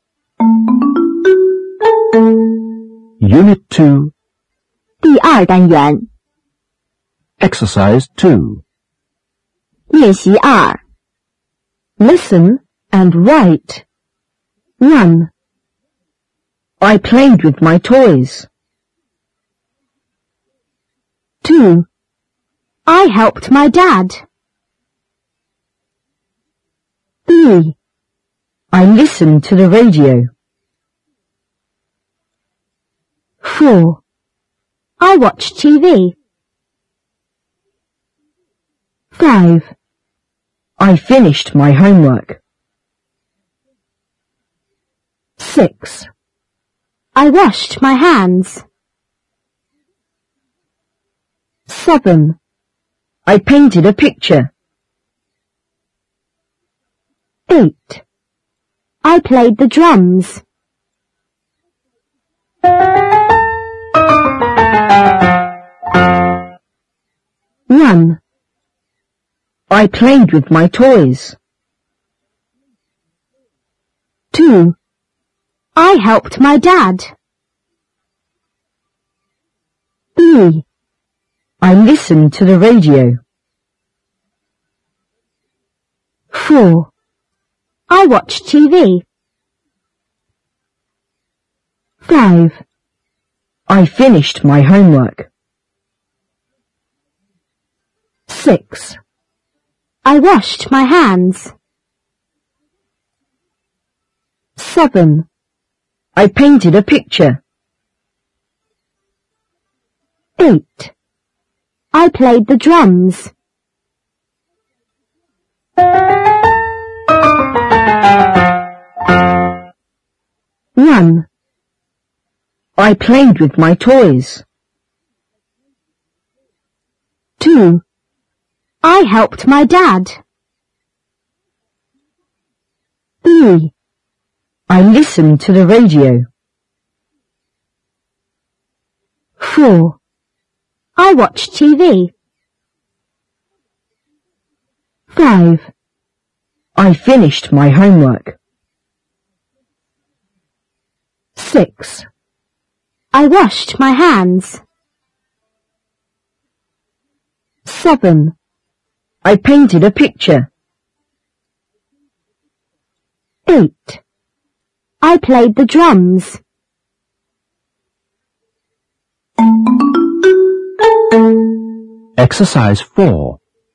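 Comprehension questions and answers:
2. Listen and write.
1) I_____ with my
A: played; toys

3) I_____ to the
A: listened; radio

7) I_____ a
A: painted; picture

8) I_____ the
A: played; drums

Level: 第七册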